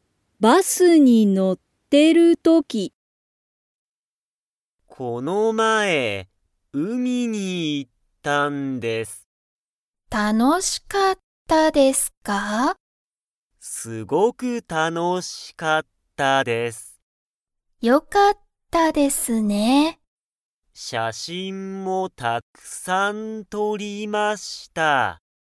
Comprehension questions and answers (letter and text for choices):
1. 高橋(たかはし)さんは、今日(きょう)、海(うみ)に行(い)きましたか?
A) はい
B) いいえ))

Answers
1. B) いいえ))

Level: Level 1